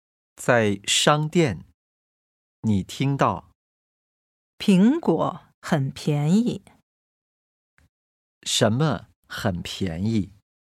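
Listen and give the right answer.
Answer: 苹果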